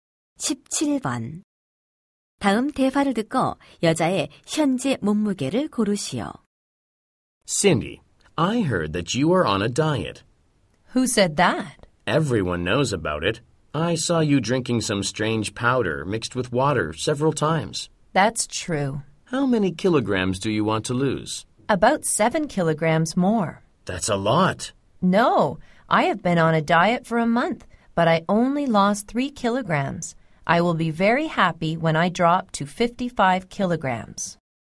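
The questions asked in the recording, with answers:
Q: 다음 대화를 듣고 여자의 현재 몸무게를 고르시오.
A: 62킬로그램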